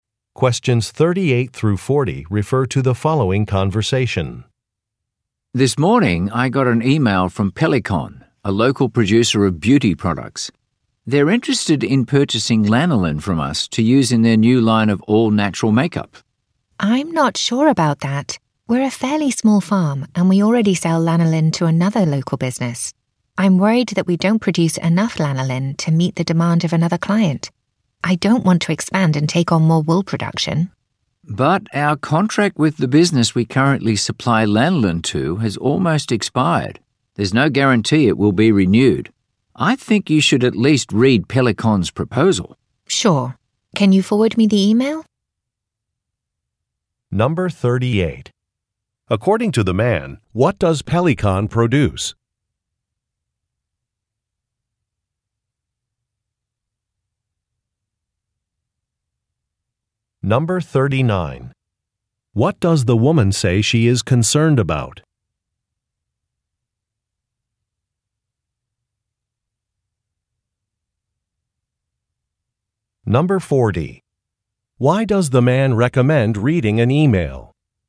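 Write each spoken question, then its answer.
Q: According to the man, what does Pelikon produce?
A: Beauty products (all-natural makeup)

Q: What does the woman say she is concerned about?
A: The farm may not produce enough lanolin to meet another client's demand

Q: Why does the man recommend reading an email?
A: Their current lanolin contract is almost expired and may not be renewed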